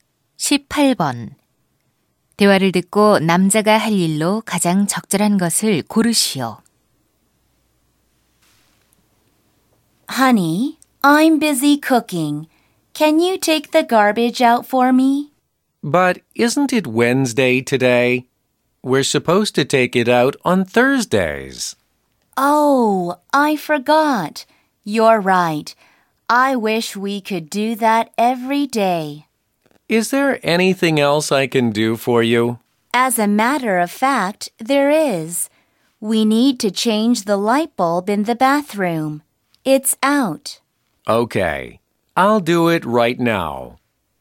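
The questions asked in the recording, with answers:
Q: 대화를 듣고 남자가 할 일로 가장 적절한 것을 고르시오.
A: 욕실 전구 교체하기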